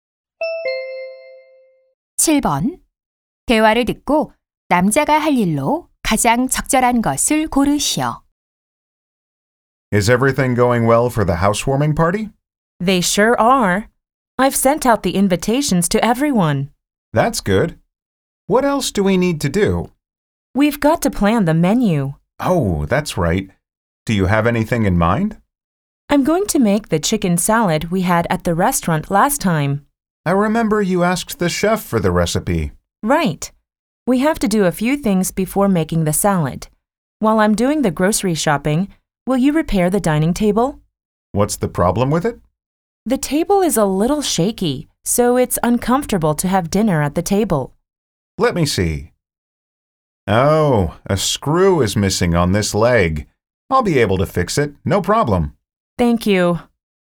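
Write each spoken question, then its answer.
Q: 대화를 듣고 남자가 할 일로 가장 적절한 것을 고르시오.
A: 식탁 수리하기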